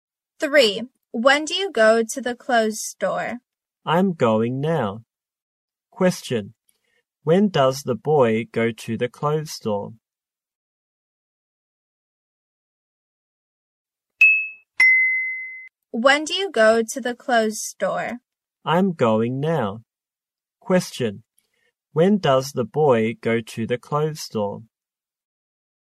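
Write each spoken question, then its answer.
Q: When does the boy go to the clothes store?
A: Now.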